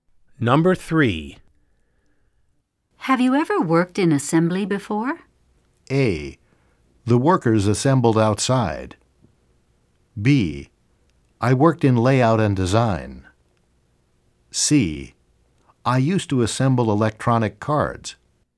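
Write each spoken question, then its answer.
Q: Have you ever worked in assembly before?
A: C: I used to assemble electronic cards.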